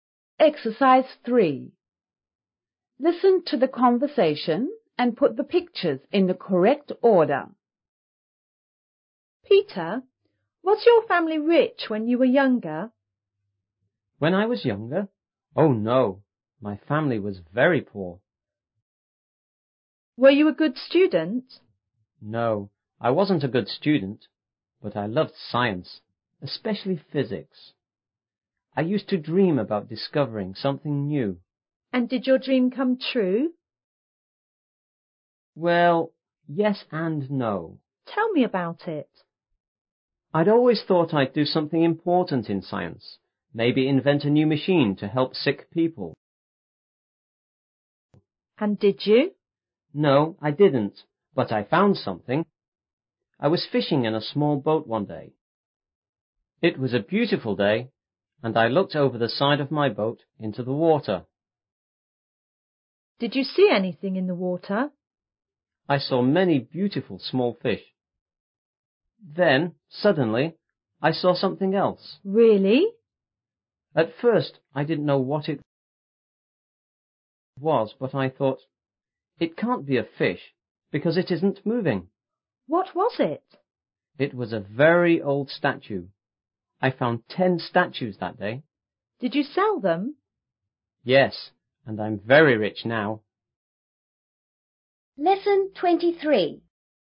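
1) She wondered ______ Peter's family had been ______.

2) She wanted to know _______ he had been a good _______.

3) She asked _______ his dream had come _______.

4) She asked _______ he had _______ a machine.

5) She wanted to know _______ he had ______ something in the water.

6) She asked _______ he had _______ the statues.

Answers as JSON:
{"1": "if; rich", "2": "if; student", "3": "if; true", "4": "if; invented", "5": "if; seen", "6": "if; sold"}

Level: 5B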